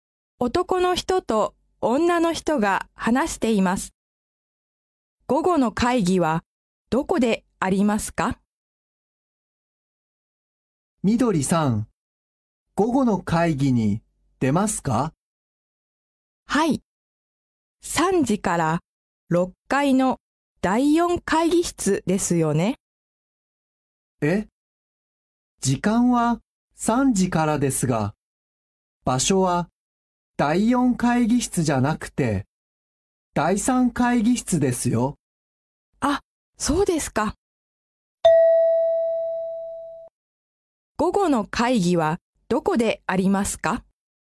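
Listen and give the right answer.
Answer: 6階の第3会議室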